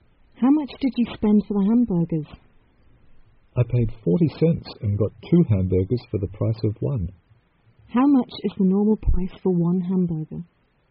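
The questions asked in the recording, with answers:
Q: How much is the normal price for one hamburger?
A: 40 cents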